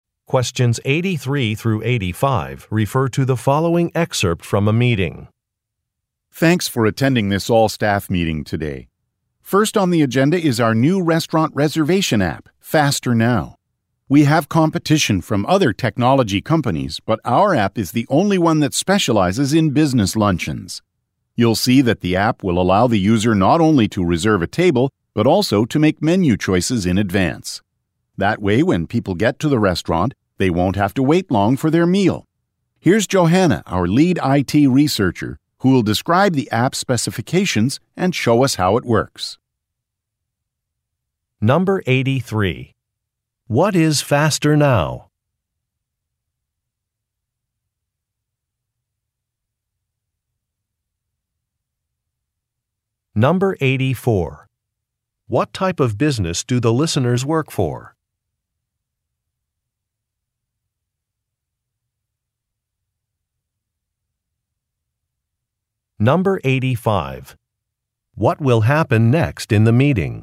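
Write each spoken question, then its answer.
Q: What is Faster Now?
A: A restaurant reservation app

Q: What type of business do the listeners work for?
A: A technology company

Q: What will happen next in the meeting?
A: Johanna will describe the app and show how it works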